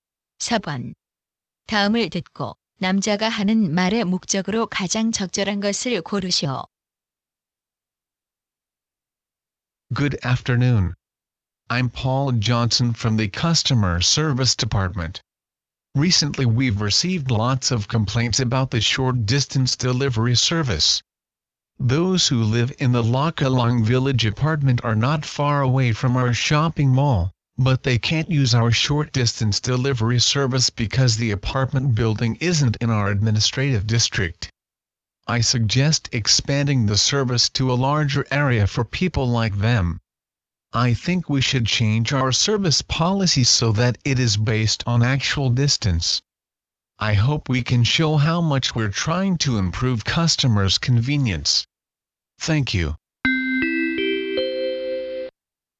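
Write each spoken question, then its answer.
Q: 다음을 듣고 남자가 하는 말의 목적으로 가장 적절한 것을 고르시오.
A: 근거리 배송 서비스를 실제 거리 기준으로 확대할 것을 제안하려고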